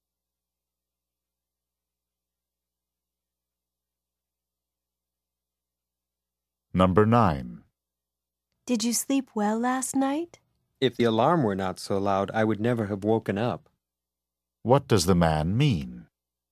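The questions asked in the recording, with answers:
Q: What does the man mean?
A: He slept very soundly.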